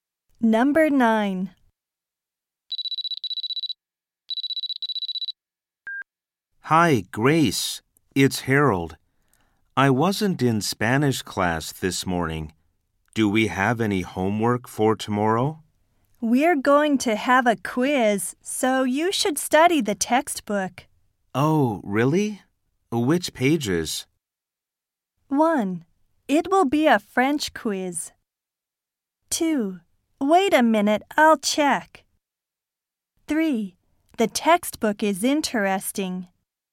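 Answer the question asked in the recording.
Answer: 2: Wait a minute, I'll check.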